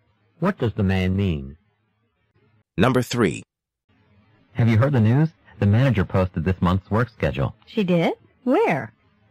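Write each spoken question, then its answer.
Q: What does the woman ask?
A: Where the work schedule was posted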